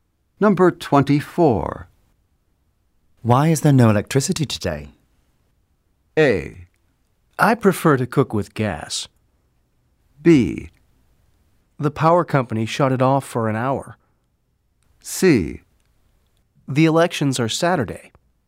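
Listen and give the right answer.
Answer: B: The power company shut it off for an hour.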